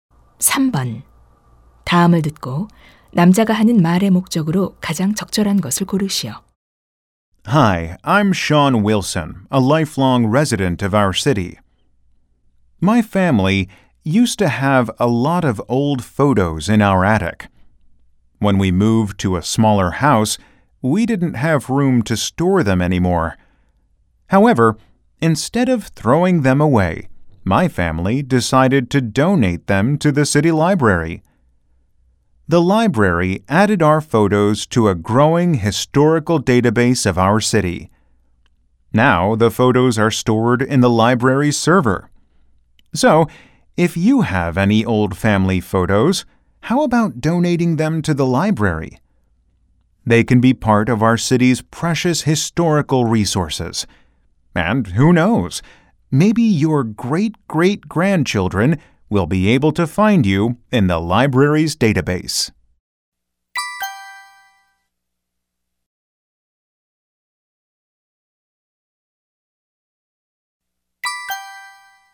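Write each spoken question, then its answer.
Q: 다음을 듣고 남자가 하는 말의 목적으로 가장 적절한 것을 고르시오.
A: 오래된 가족 사진을 시립 도서관에 기증하도록 권장하려고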